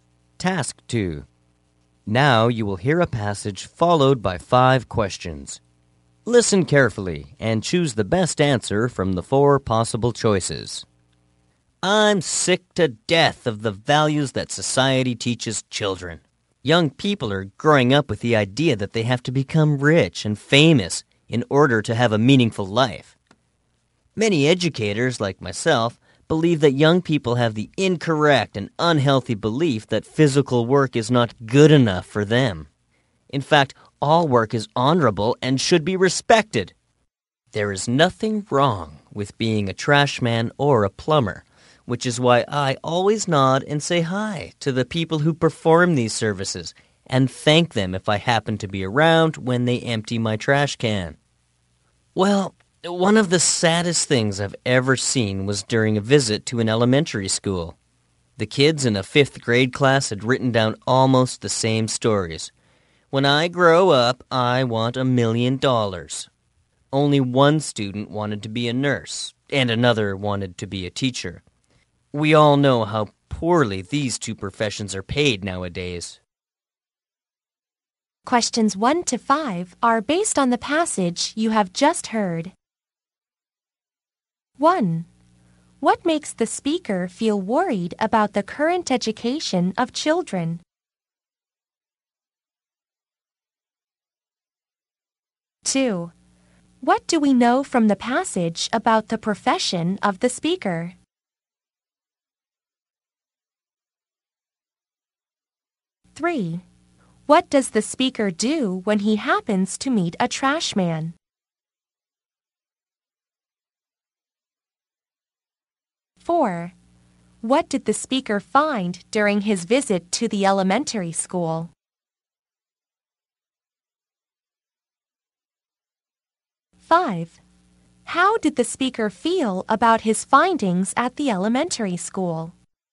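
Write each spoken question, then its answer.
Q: What makes the speaker feel worried about the current education of children?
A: Society teaches them they must be rich and famous to have a meaningful life.

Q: What do we know from the passage about the profession of the speaker?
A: He is an educator.

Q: What does the speaker do when he happens to meet a trash man?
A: Nods, says hi and thanks him.

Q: What did the speaker find during his visit to the elementary school?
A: Almost all the kids wrote that they wanted $1,000,000.

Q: How did the speaker feel about his findings at the elementary school?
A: Sad.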